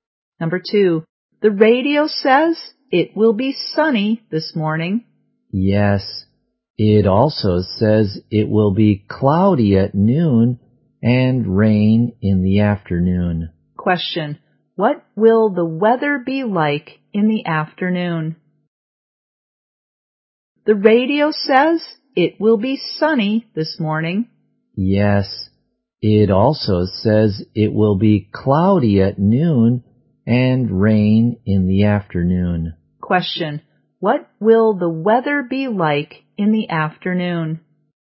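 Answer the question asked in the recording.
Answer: Rainy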